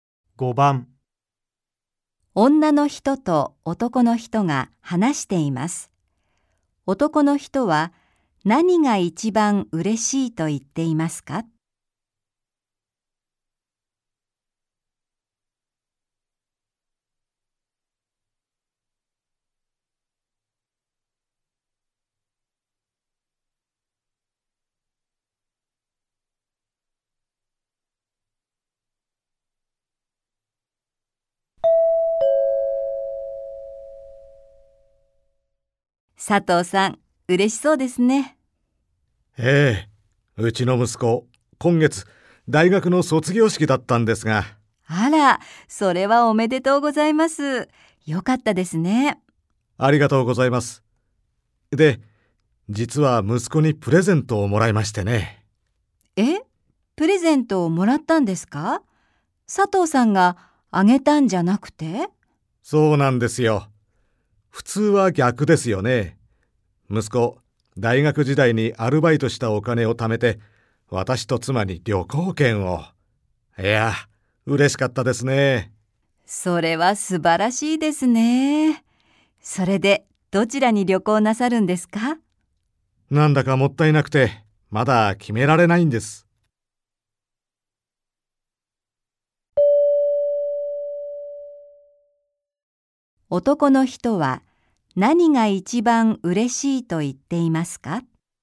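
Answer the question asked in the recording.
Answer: 息子がアルバイトで貯めたお金で旅行券をくれたこと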